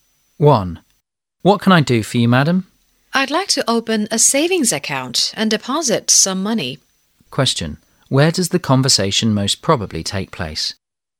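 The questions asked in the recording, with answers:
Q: Question: Where does the conversation most probably take place?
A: In a bank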